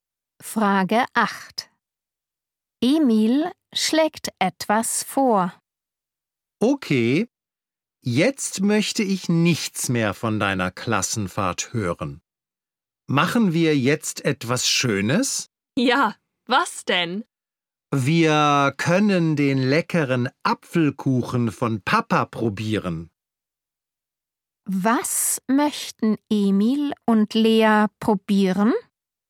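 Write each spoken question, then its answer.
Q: Was möchten Emil und Lea probieren?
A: Papas Apfelkuchen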